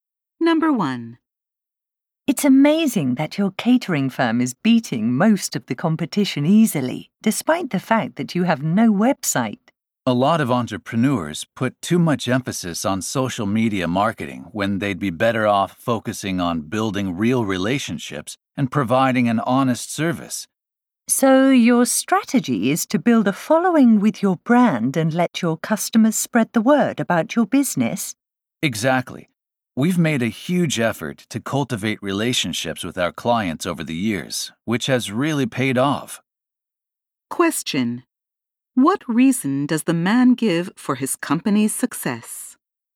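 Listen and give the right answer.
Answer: Building strong relationships with clients over the years, so customers spread the word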